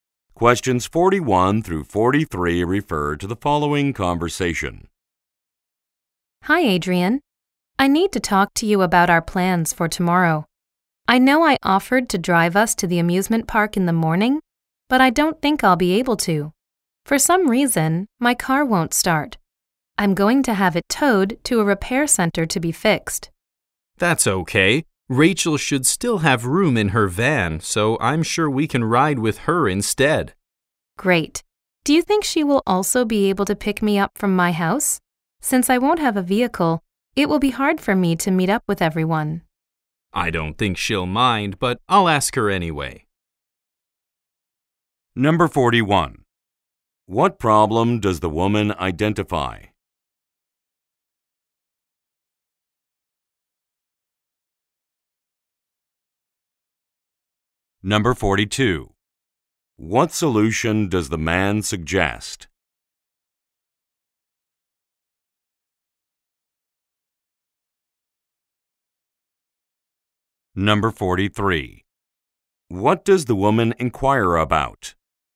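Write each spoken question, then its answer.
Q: What problem does the woman identify?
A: Her car won't start

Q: What solution does the man suggest?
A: Riding with Rachel in her van

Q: What does the woman inquire about?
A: Whether Rachel can pick her up from her house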